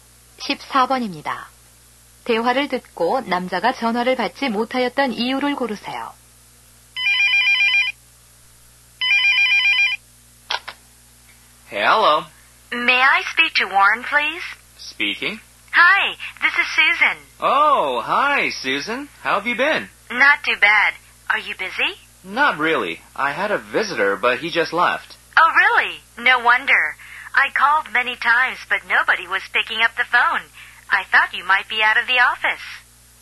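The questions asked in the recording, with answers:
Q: 대화를 듣고 남자가 전화를 받지 못하였던 이유를 고르세요.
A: 손님이 와 있어서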